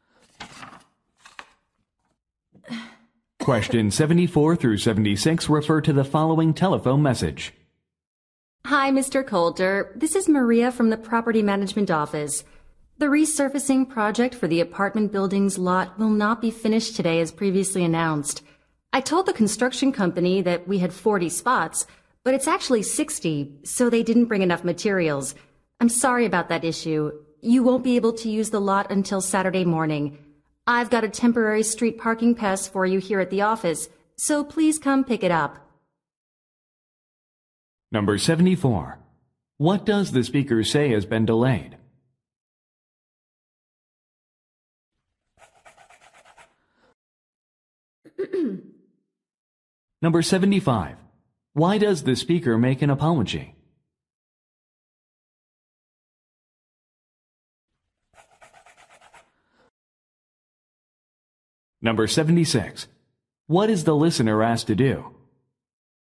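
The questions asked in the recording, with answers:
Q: What does the speaker say has been delayed?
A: The resurfacing of the parking lot

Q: Why does the speaker make an apology?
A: She gave the construction company the wrong number of parking spots

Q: What is the listener asked to do?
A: Pick up a temporary street parking pass at the office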